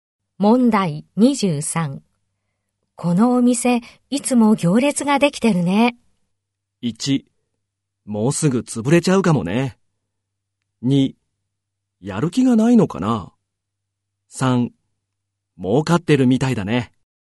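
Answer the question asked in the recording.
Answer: 3: 儲かってるみたいだね。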